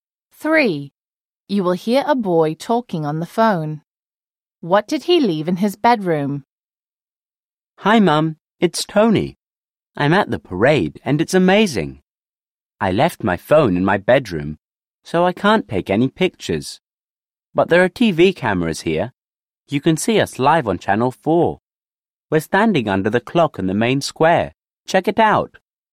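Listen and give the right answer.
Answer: His phone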